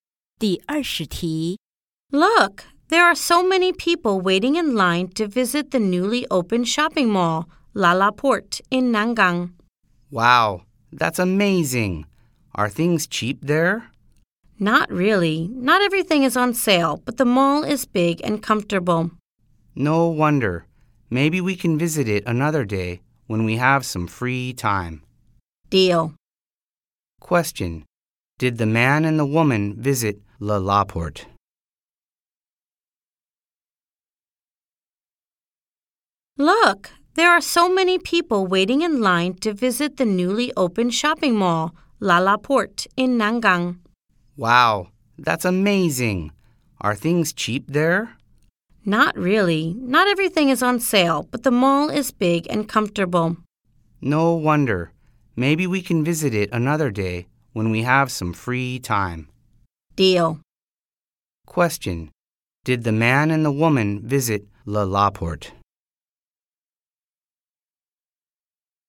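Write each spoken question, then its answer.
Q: Did the man and the woman visit LaLaport?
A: No, not yet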